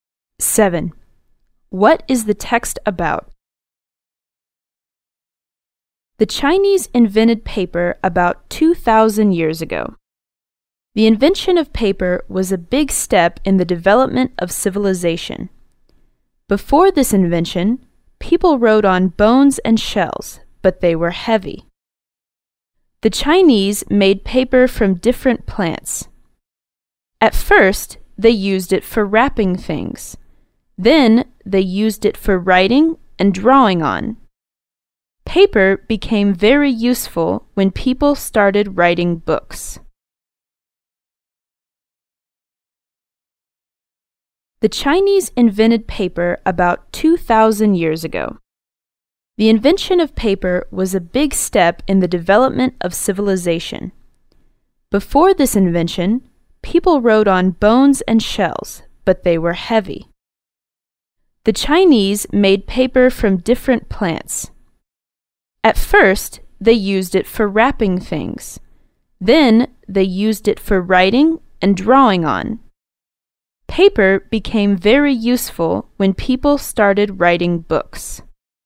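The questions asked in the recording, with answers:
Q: What is the text about?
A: The Chinese invention of paper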